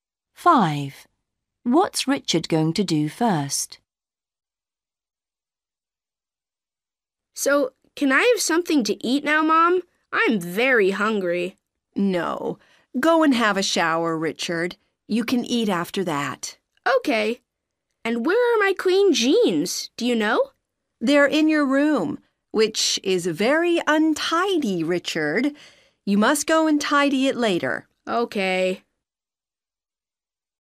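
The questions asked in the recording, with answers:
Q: What's Richard going to do first?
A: have a shower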